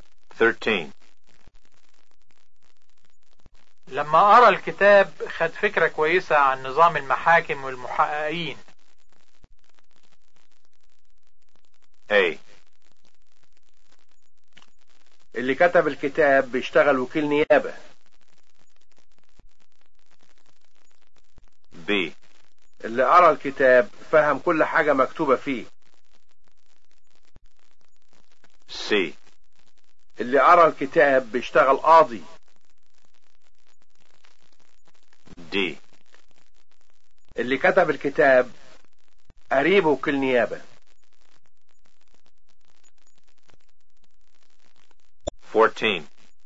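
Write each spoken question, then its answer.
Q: لما أرى الكتاب خد فكرة كويسة عن نظام المحاكم والمحققين.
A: B: اللي أرى الكتاب فهم كل حاجة مكتوبة فيه.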